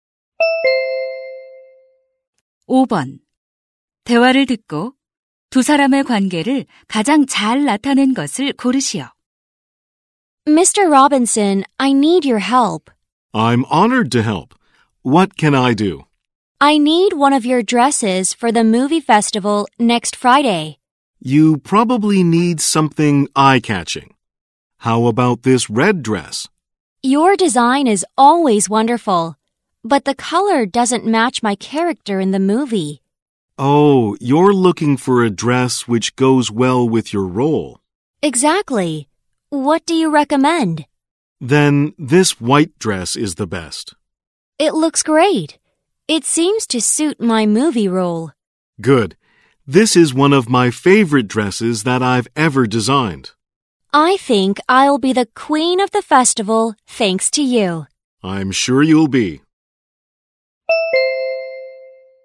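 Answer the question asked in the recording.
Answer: 영화배우 - 의상 디자이너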